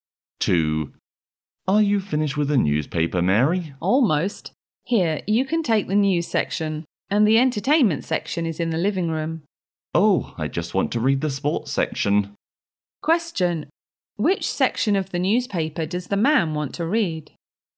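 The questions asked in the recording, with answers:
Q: Which section of the newspaper does the man want to read?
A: The sports section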